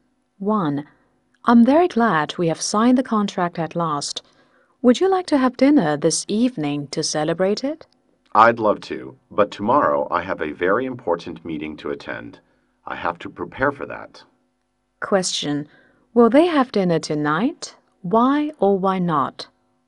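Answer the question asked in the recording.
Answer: No, because the second speaker has an important meeting tomorrow and must prepare for it.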